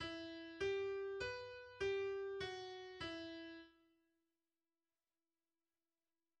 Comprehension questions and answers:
Entscheide zuerst nur: Dur oder Moll?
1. Dur oder Moll?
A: e-Moll